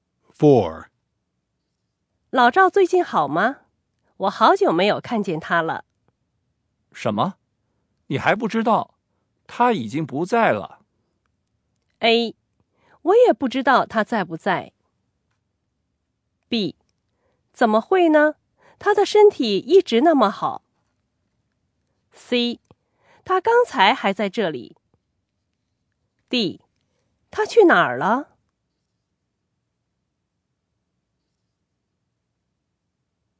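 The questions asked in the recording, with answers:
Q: 你还不知道? 他已经不在了。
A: B: 怎么会呢? 他的身体一直那么好。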